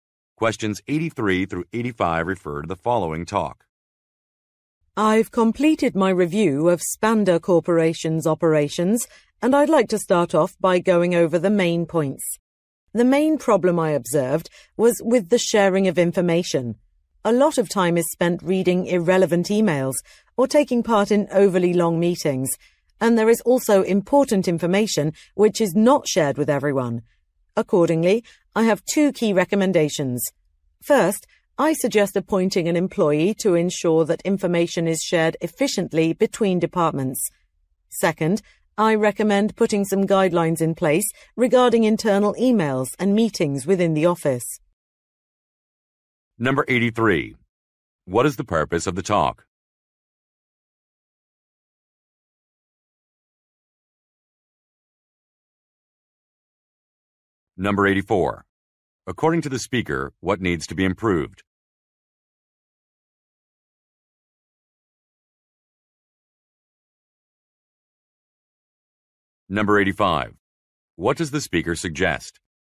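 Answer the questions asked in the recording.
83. To report the results of a review of a company's operations.
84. The sharing of information.
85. Appointing an employee to manage information sharing between departments, and setting email and meeting guidelines.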